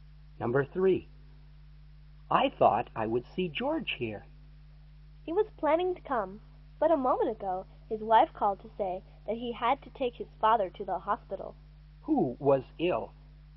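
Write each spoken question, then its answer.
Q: Who was ill?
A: George's father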